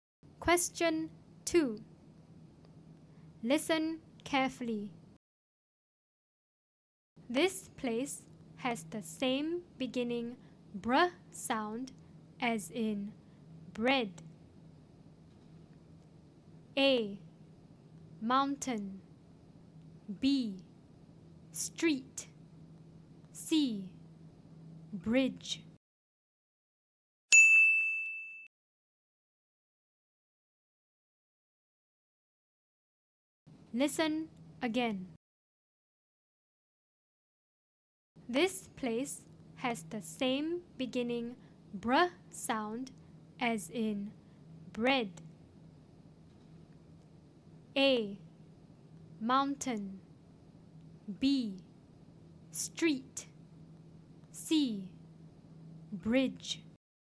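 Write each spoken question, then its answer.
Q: This place has the same beginning br sound as in bread.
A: C: Bridge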